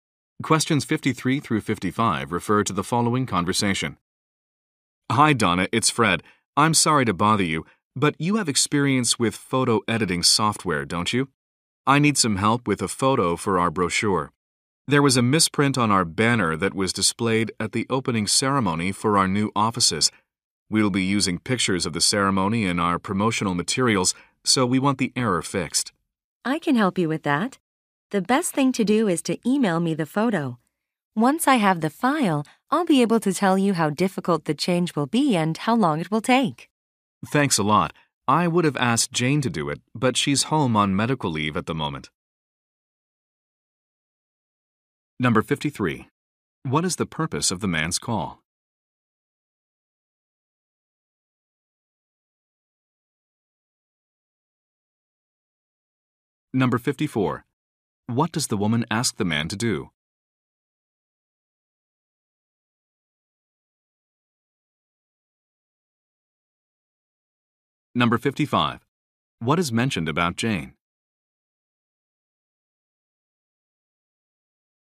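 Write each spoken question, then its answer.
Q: What is the purpose of the man's call?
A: To ask for help editing a photo

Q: What does the woman ask the man to do?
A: Email her the photo

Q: What is mentioned about Jane?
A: She is on medical leave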